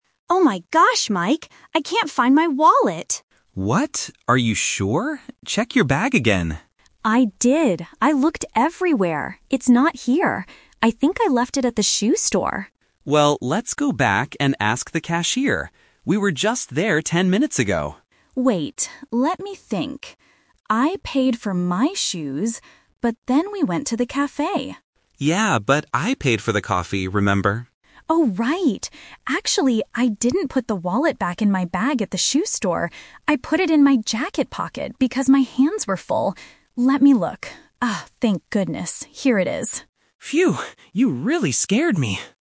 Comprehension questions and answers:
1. Where did the woman first think she left her wallet?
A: At the shoe store

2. Who paid for the drinks at the cafe?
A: Mike

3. Where was the wallet exactly?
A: In her jacket pocket

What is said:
Sarah: Oh my gosh, Mike. I can't find my wallet!
Mike: What? Are you sure? Check your bag again.
Sarah: I did! I looked everywhere. It's not here. I think I left it at the shoe store.
Mike: Well, let's go back and ask the cashier. We were just there ten minutes ago.
Sarah: Wait, let me think. I paid for my shoes... but then we went to the cafe.
Mike: Yeah, but I paid for the coffee, remember?
Sarah: Oh, right! Actually, I didn't put the wallet back in my bag at the shoe store. I put it in my jacket pocket because my hands were full! Let me look... Oh, thank goodness. Here it is.